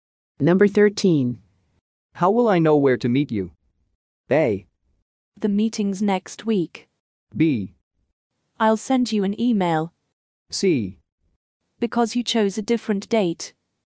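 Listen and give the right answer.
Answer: B: I'll send you an email.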